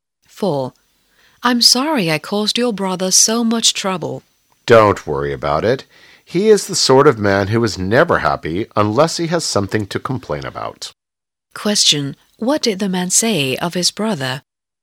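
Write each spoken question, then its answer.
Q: What did the man say of his brother?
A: He always complains about something.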